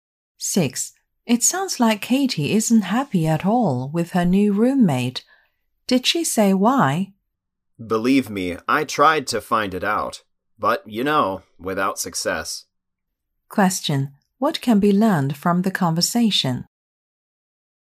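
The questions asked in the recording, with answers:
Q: What can be learned from the conversation?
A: The man doesn't know why Katie is unhappy with her roommate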